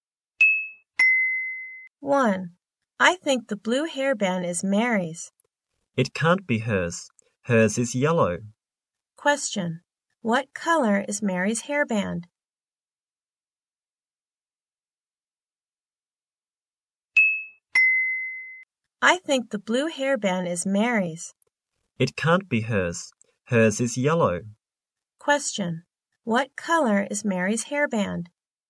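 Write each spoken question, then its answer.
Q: What color is Mary's hairband?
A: Yellow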